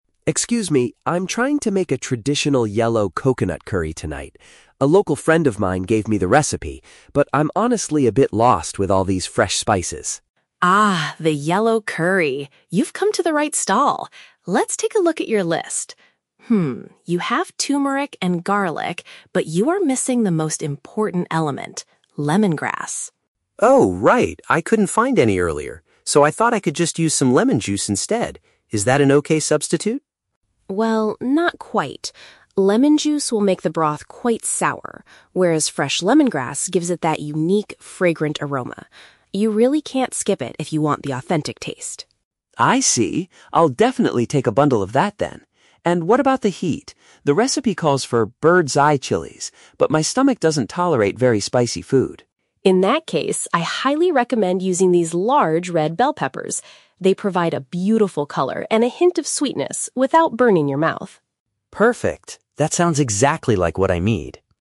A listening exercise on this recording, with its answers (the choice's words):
Listen to the conversation between a foreigner and a market vendor. Choose the correct answer (A, B, or C) for each question.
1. Why is Tom asking the vendor for assistance?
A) He wants her to teach him how to cook a local dish.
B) He needs guidance on selecting the correct seasonings.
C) He is looking for a place to buy fresh coconut milk.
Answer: He needs guidance on selecting the correct seasonings.

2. What does the vendor say about using lemon juice in the recipe?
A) It is a perfect replacement if he cannot find lemongrass.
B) It will give the curry the exact authentic flavor he wants.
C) It will change the expected taste of the traditional meal.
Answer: It will change the expected taste of the traditional meal.

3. How does the vendor solve Tom's problem with spicy ingredients?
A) She suggests buying a sweeter type of vegetable instead.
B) She advises him to simply reduce the number of chilies.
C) She tells him to add extra coconut milk to cool it down.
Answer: She suggests buying a sweeter type of vegetable instead.

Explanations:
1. Tom says he is "lost with all these fresh spices" (needs guidance on selecting seasonings). Option (A) is a trap; a "local friend" already gave him the recipe, he isn't asking the vendor to teach him how to cook. Option (C) is a trap using the word "coconut", but he is looking for spices, not milk.
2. Mrs. Lin says lemon juice "will make the broth quite sour", which means it changes the expected taste compared to the "fragrant aroma" of lemongrass. Option (A) is a trap; Tom suggests this idea, but Mrs. Lin rejects it ("Well, not quite"). Option (B) is the opposite of what the vendor says.
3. Mrs. Lin recommends using "large red bell peppers" because they provide a "hint of sweetness without burning your mouth" (a sweeter type of vegetable). Option (B) is a plausible cooking tip in real life, but the vendor doesn't say this; she changes the ingredient entirely. Option (C) is never mentioned in the audio.

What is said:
Tom: Excuse me, I'm trying to make a traditional yellow coconut curry tonight. A local friend of mine gave me the recipe, but I'm honestly a bit lost with all these fresh spices.
Lin: Ah, the yellow curry! You've come to the right stall. Let's take a look at your list. Hmm, you have turmeric and garlic, but you are missing the most important element: lemongrass.
Tom: Oh, right! I couldn't find any earlier, so I thought I could just use some lemon juice instead. Is that an okay substitute?
Lin: Well, not quite. Lemon juice will make the broth quite sour, whereas fresh lemongrass gives it that unique, fragrant aroma. You really can't skip it if you want the authentic taste.
Tom: I see! I'll definitely take a bundle of that, then. And what about the heat? The recipe calls for "bird's eye chilies," but my stomach doesn't tolerate very spicy food.
Lin: In that case, I highly recommend using these large red bell peppers. They provide a beautiful color and a hint of sweetness without burning your mouth.